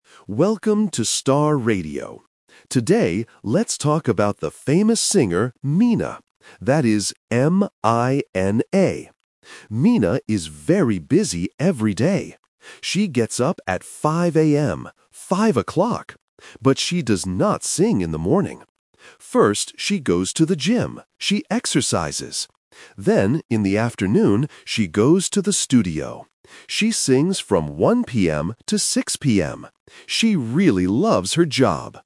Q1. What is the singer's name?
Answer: Mina

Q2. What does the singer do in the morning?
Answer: She goes to the gym.

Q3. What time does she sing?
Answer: 1:00 PM

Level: A1